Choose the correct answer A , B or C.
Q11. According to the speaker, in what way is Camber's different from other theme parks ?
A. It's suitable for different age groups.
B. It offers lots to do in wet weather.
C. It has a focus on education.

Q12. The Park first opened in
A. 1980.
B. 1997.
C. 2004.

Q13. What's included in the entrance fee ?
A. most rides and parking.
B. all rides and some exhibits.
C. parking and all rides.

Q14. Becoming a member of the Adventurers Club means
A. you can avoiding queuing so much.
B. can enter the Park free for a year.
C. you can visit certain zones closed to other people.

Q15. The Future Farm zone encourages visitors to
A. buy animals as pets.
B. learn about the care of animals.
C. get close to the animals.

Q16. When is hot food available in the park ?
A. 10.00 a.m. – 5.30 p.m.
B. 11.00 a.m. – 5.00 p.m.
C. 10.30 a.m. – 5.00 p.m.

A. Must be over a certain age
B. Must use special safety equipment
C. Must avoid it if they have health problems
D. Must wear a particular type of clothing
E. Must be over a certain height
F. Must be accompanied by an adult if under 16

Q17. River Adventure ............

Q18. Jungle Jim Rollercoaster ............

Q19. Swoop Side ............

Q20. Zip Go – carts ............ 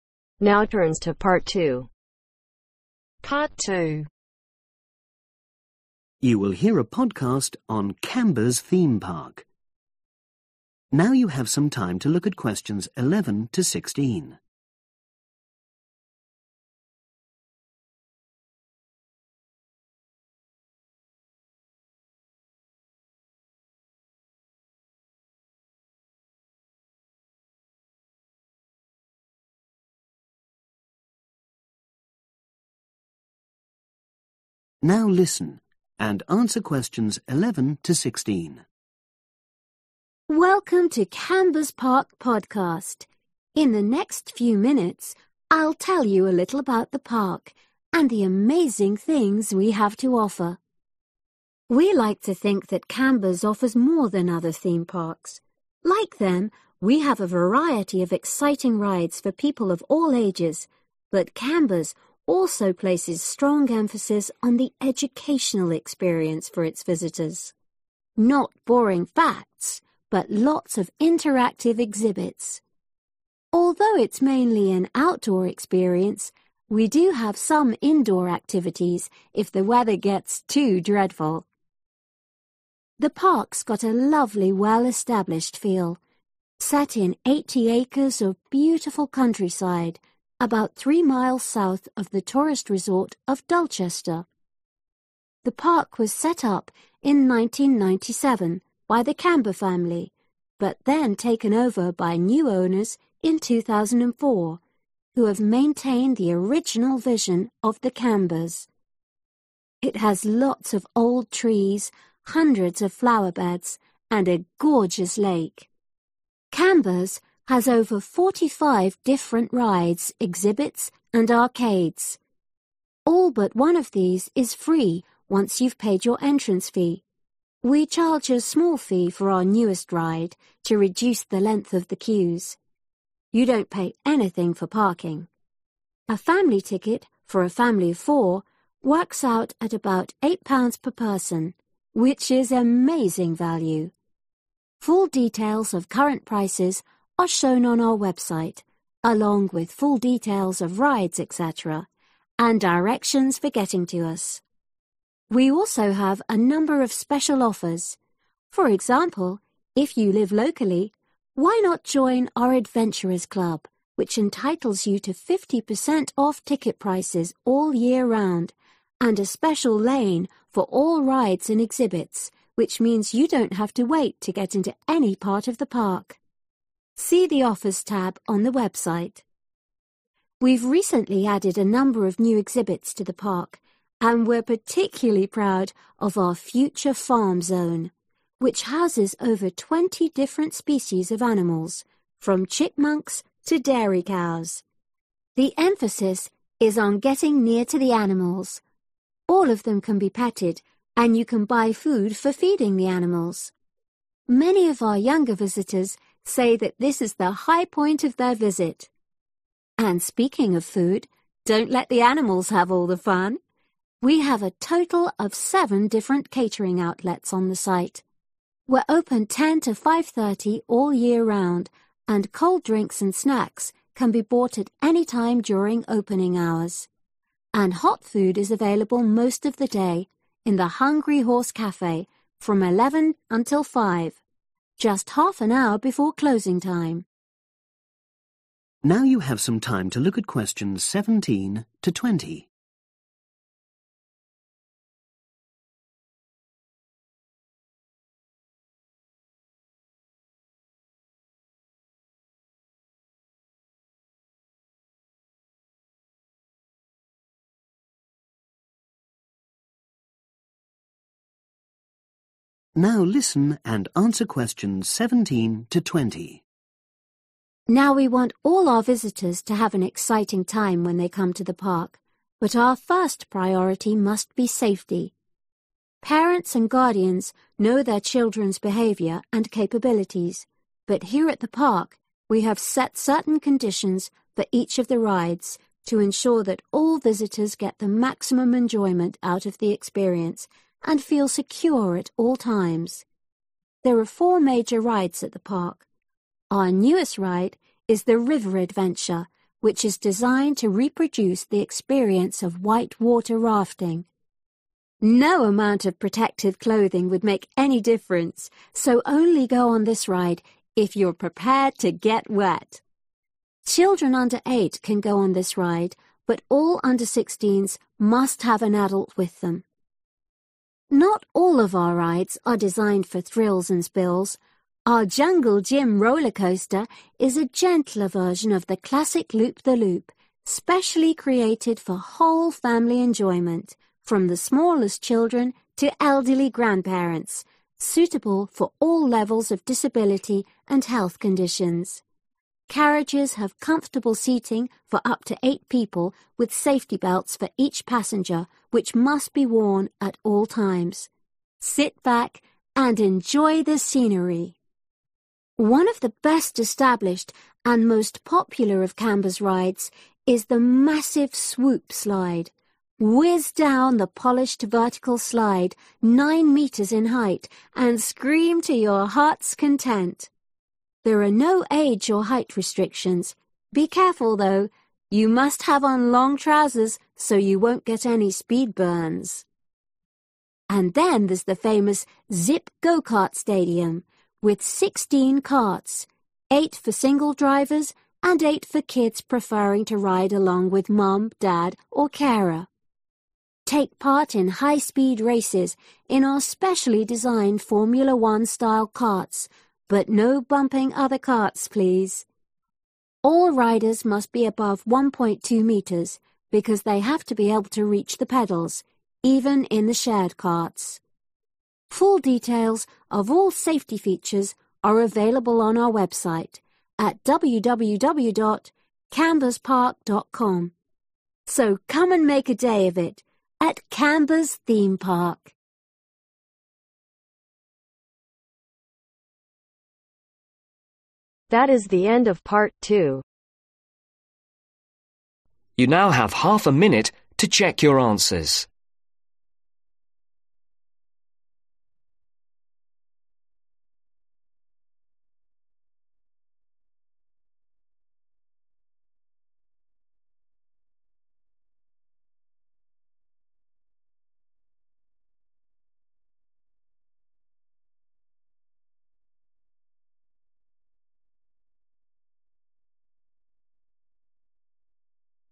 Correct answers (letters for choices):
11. C
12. B
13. A
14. A
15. C
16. B
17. F
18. B
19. D
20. E